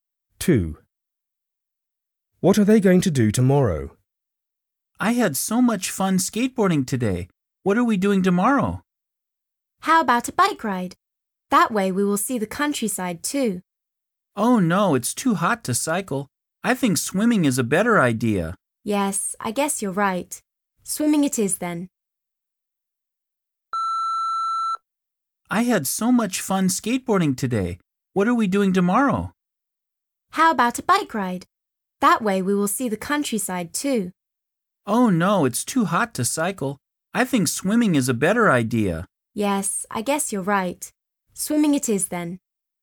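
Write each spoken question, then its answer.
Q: What are they going to do tomorrow?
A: Go swimming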